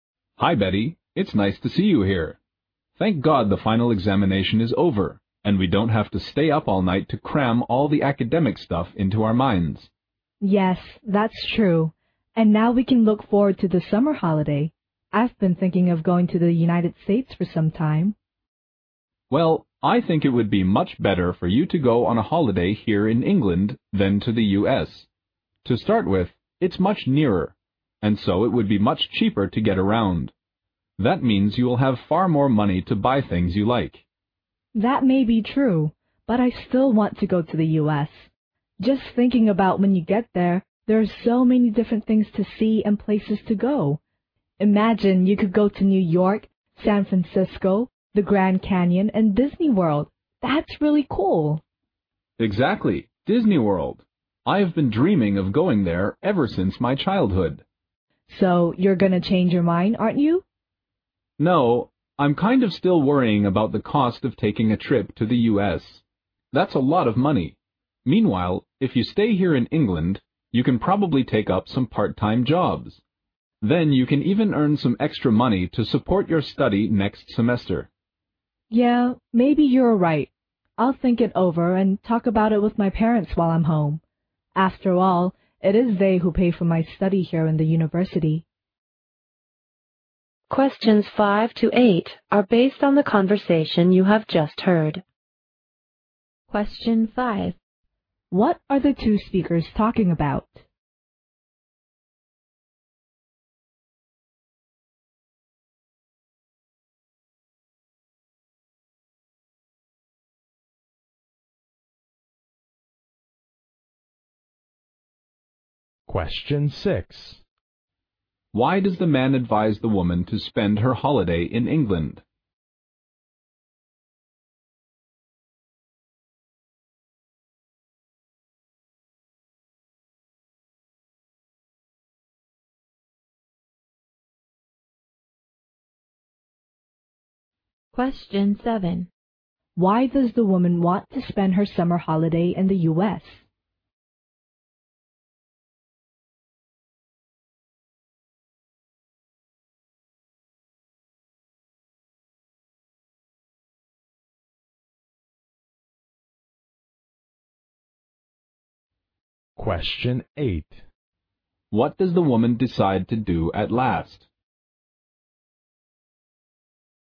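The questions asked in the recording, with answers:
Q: What are the two speakers talking about?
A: Where to spend the summer holiday

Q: Why does the man advise the woman to spend her holiday in England?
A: It is nearer and cheaper

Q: Why does the woman want to spend her summer holiday in the U.S.?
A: There are so many things to see and places to go, like Disney World

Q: What does the woman decide to do at last?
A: Think it over and talk with her parents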